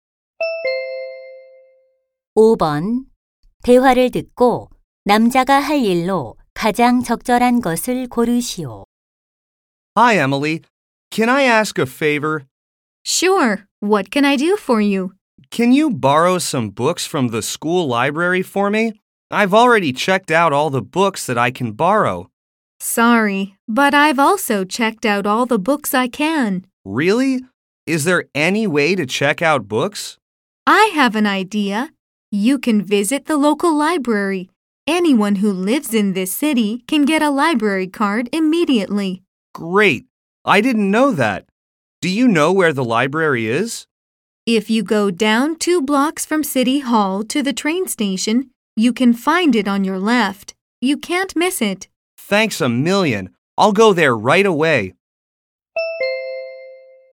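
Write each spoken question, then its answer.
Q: 대화를 듣고 남자가 할 일로 가장 적절한 것을 고르시오.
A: 지역 도서관에 가기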